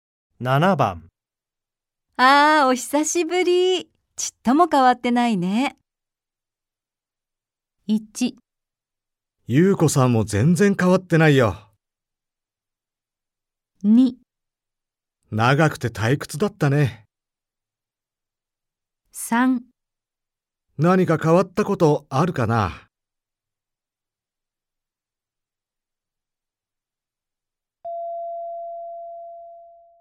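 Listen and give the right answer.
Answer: 1: 優子さんも全然変わってないよ。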